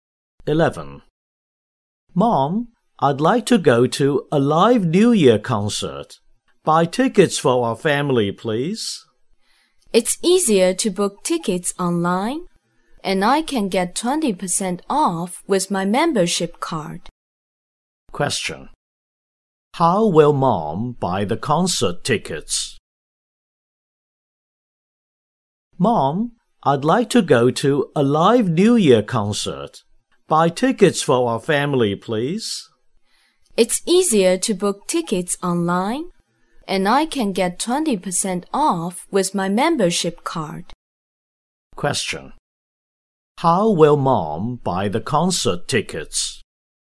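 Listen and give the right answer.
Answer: Online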